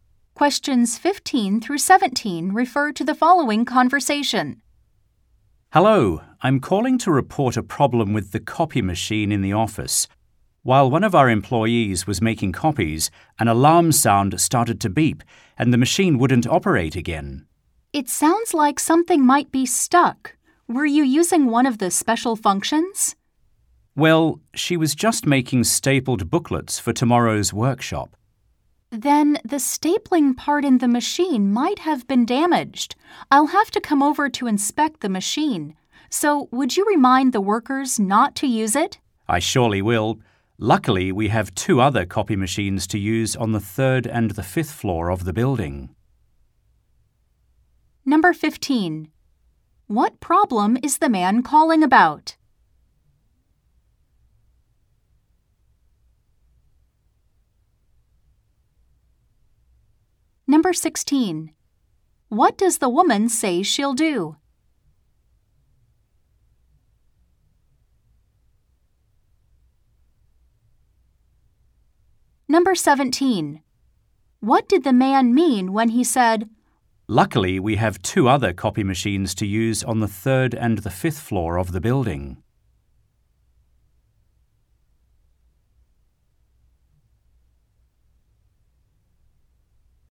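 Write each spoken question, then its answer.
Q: What problem is the man calling about?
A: The copy machine stopped working after an alarm beeped, possibly something stuck

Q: What does the woman say she'll do?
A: Come over to inspect the machine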